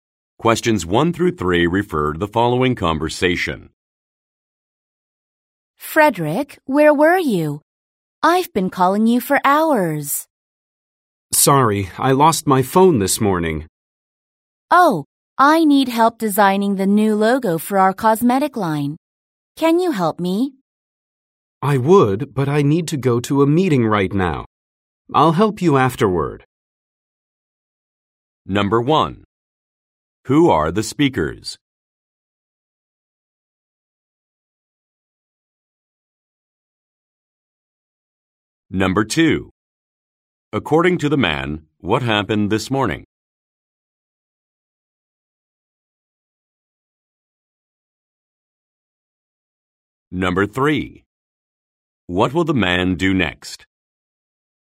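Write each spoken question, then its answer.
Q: According to the man, what happened this morning?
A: He lost his phone.

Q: What will the man do next?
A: Go to a meeting.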